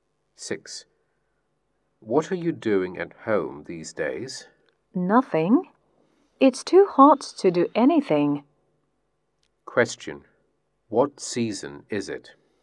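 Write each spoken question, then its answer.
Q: Question, what season is it?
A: Summer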